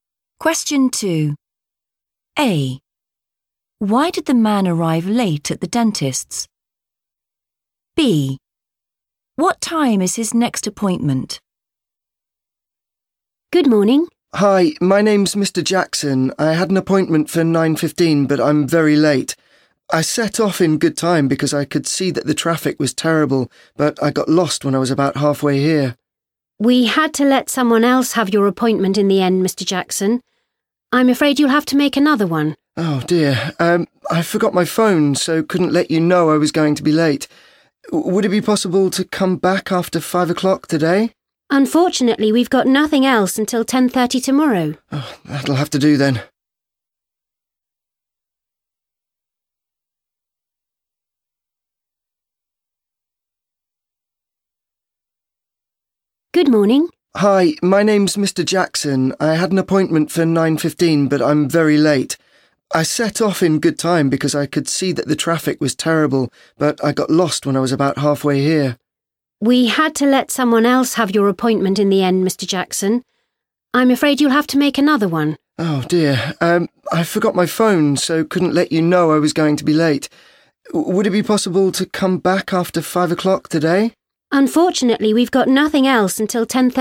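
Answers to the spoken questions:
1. he got lost
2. 10:30 tomorrow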